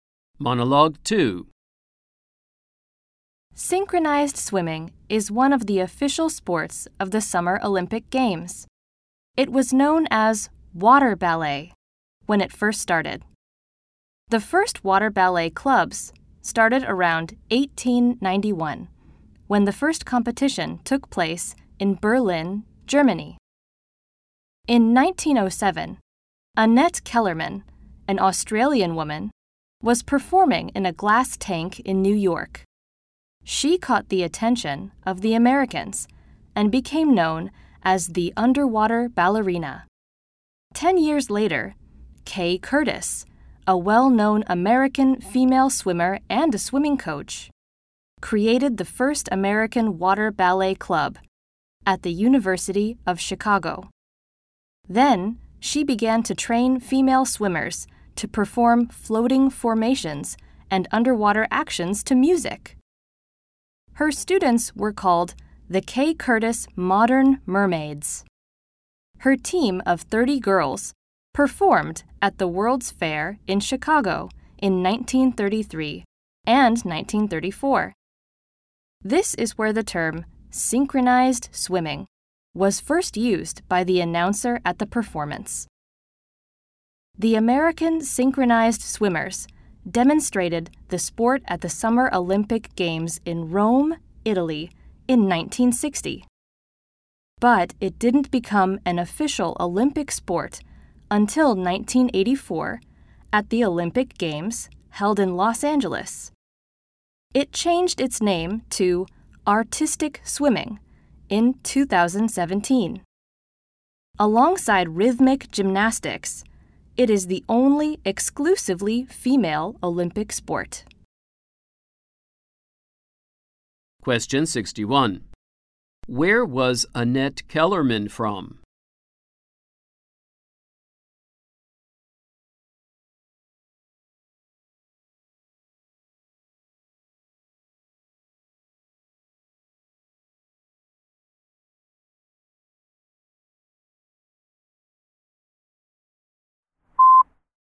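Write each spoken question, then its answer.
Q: Where was Annette Kellerman from?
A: Australia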